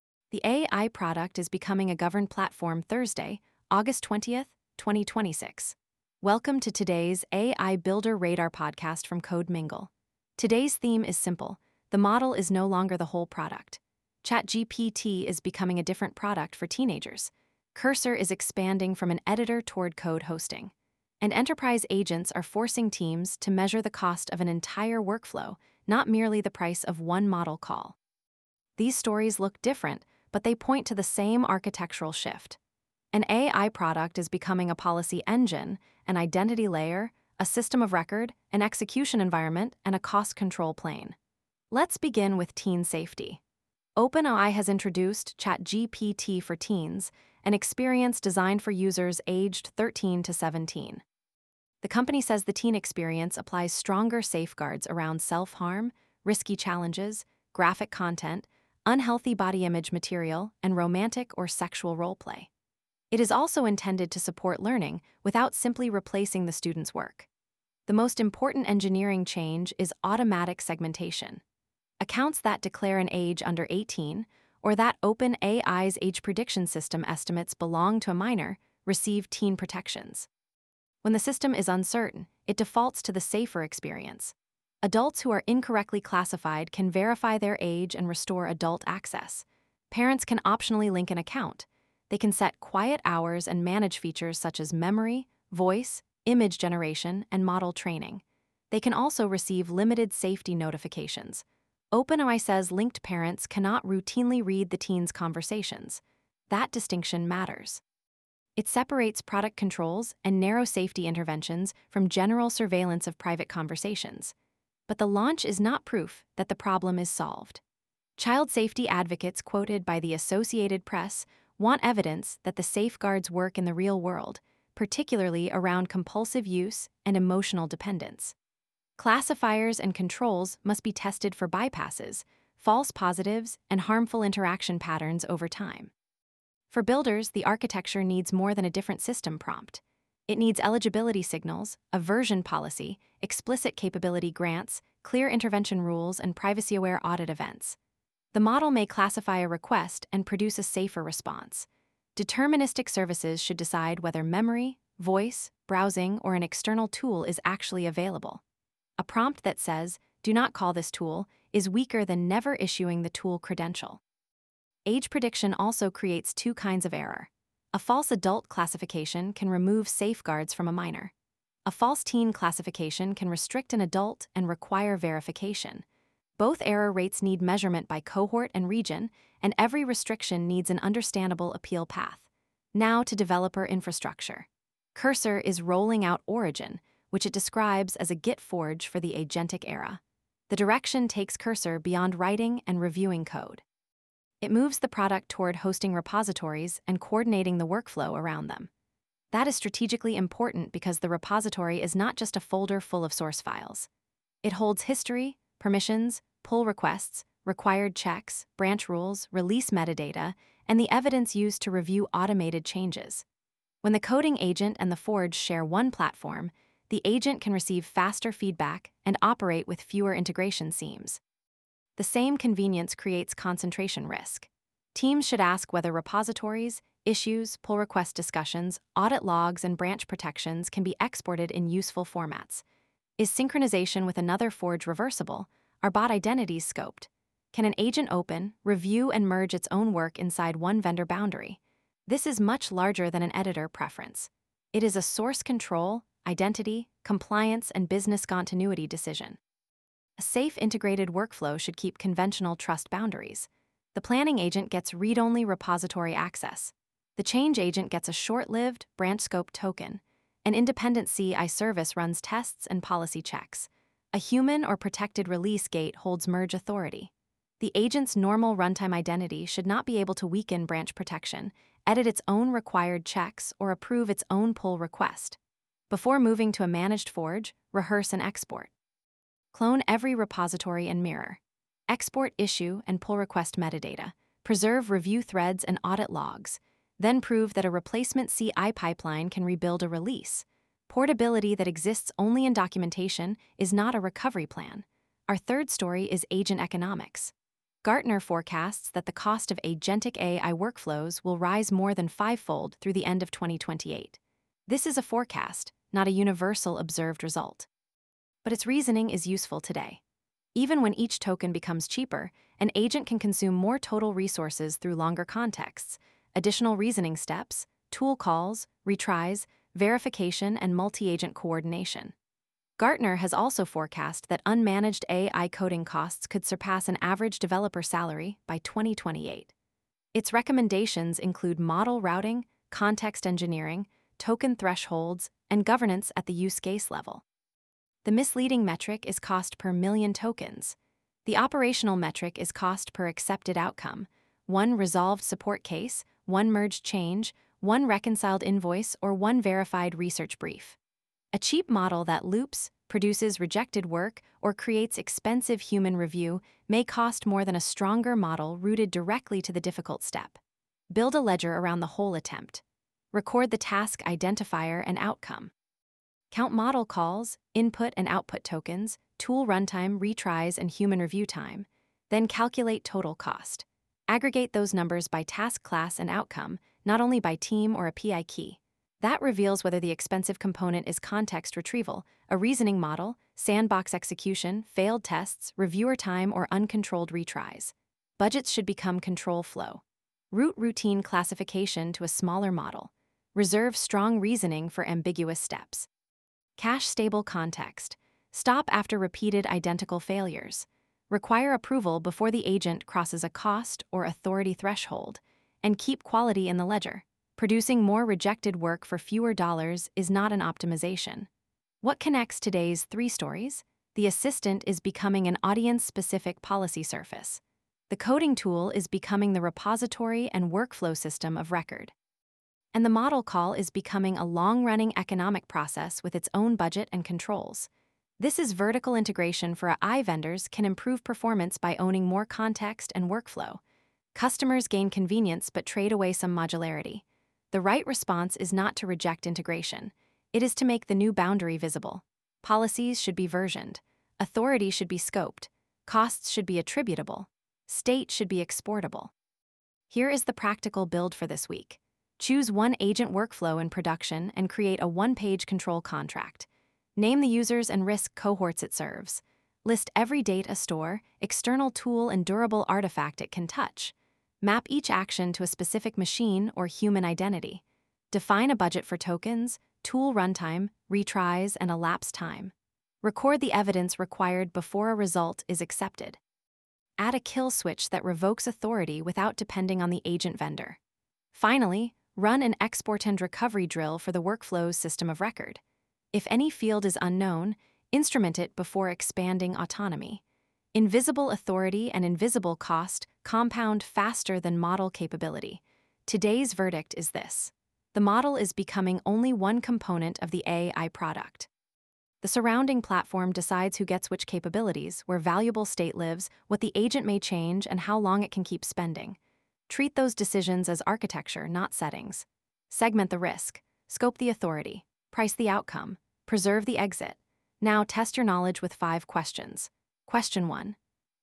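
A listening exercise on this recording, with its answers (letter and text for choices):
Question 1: What happens when OpenAI's age-prediction system estimates that a ChatGPT account belongs to someone under 18?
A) The account is permanently deleted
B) Teen safeguards are applied automatically, with age verification available for misclassified adults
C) Every conversation is sent to a parent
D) The account receives unrestricted adult capabilities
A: B) Teen safeguards are applied automatically, with age verification available for misclassified adults

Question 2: Why is Cursor Origin strategically more significant than a normal editor feature?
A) It changes the editor's color scheme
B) It moves Cursor toward hosting the repository and its surrounding development workflow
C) It removes Git from software development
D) It guarantees that agents can merge without review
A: B) It moves Cursor toward hosting the repository and its surrounding development workflow

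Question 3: Which metric best captures the real economics of an agent workflow?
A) The model's context-window size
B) The number of tools installed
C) Cost per accepted outcome, including retries, tools, and human review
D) The lowest advertised token price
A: C) Cost per accepted outcome, including retries, tools, and human review

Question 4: What is the safest way to prevent a coding agent from using a prohibited capability?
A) Mention the restriction once in the prompt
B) Give the agent administrator access but ask it to be careful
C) Enforce the restriction outside the model by withholding the credential or capability grant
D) Hide the action from the user interface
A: C) Enforce the restriction outside the model by withholding the credential or capability grant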